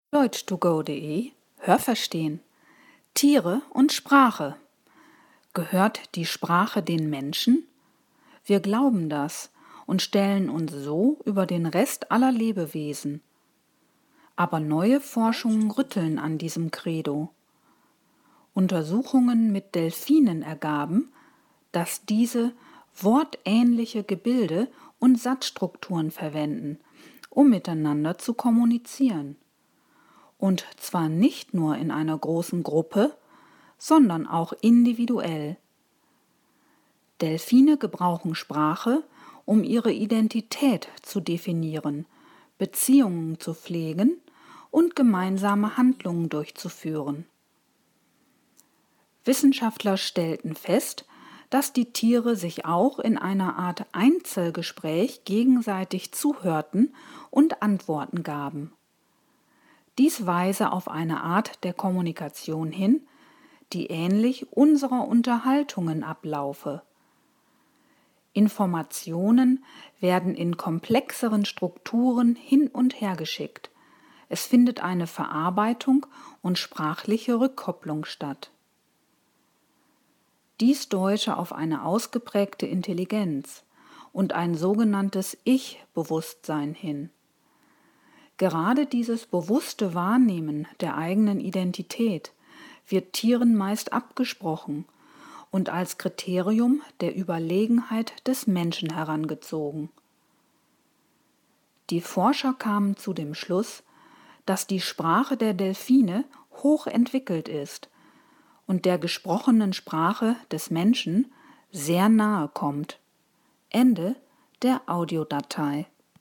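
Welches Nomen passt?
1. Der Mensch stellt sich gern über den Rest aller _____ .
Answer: Lebewesen

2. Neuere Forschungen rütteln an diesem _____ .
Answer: Credo

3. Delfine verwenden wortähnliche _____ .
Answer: Gebilde

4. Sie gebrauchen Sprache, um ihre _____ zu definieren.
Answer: Identität

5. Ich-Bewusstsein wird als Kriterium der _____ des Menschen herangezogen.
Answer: Überlegenheit

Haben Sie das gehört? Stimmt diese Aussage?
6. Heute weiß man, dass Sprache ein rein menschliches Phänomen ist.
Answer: falsch

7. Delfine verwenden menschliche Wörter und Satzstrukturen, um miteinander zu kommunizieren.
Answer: falsch

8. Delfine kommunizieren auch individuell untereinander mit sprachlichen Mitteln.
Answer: richtig

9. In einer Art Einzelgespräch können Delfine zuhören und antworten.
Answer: richtig

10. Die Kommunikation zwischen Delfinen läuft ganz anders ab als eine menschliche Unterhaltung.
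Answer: falsch

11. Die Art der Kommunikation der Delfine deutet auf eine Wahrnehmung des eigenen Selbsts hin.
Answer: richtig

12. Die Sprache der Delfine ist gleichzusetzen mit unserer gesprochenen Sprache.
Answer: falsch

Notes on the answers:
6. Neuere Forschungen zeigen am Beispiel von Delfinen, dass auch Tiere über sprachliche Strukturen verfügen.
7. Sie verwenden wortähnliche Gebilde und Satzstrukturen.
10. Laut Text ähnelt sie dieser.
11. Dies bezeichnet man auch als Ich-Bewusstsein.
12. Aber sie kommt dieser laut Text nahe.

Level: Hörtexte C (schwer)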